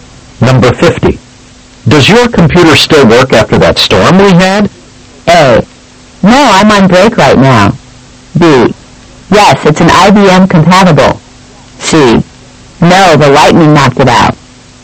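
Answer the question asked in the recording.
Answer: C: No, the lightning knocked it out.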